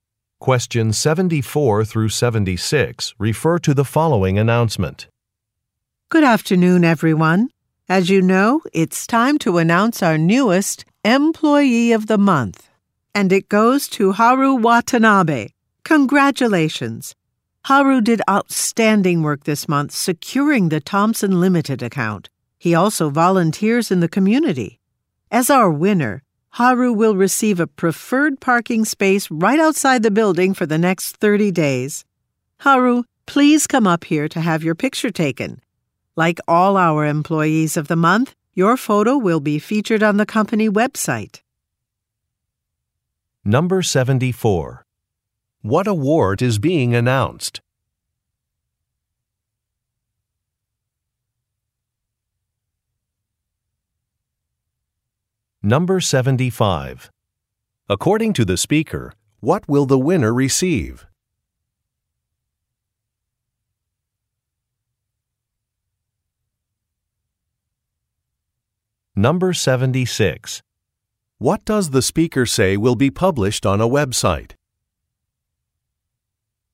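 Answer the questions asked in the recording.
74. Employee of the Month
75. A preferred parking space right outside the building for 30 days
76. The winner's photo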